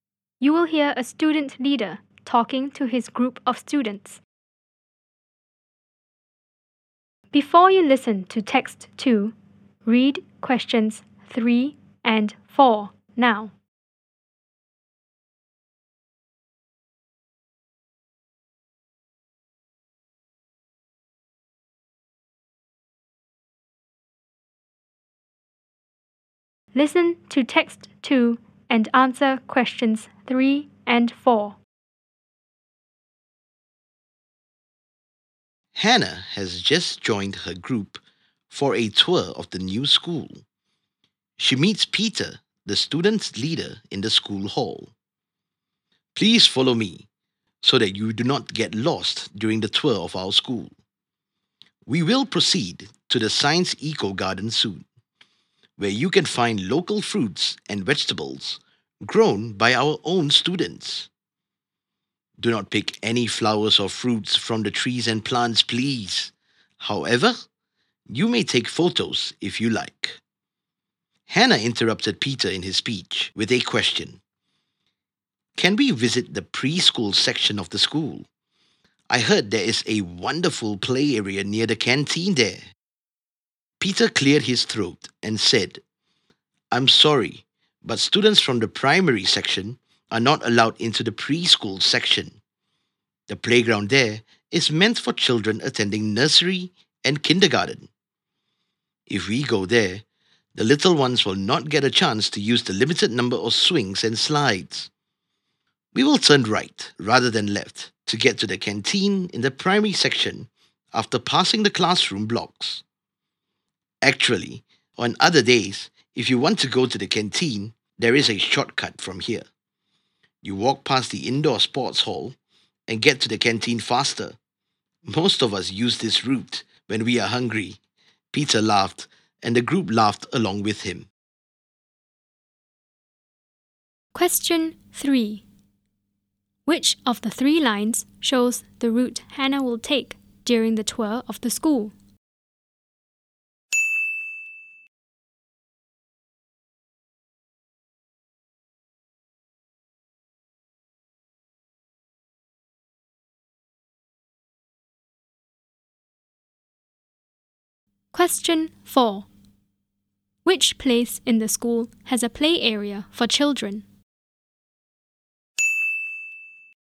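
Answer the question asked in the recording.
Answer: The preschool section (near its canteen)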